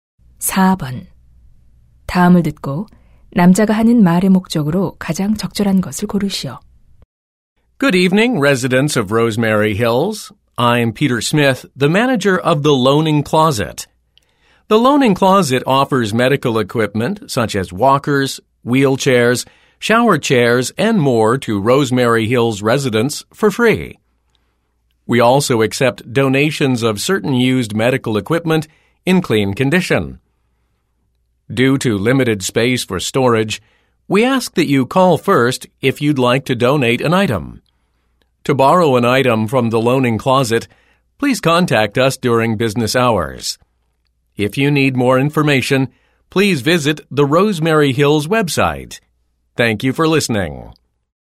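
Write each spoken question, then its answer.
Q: 다음을 듣고 남자가 하는 말의 목적으로 가장 적절한 것을 고르시오.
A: 의료 장비 무료 대여 서비스를 안내하려고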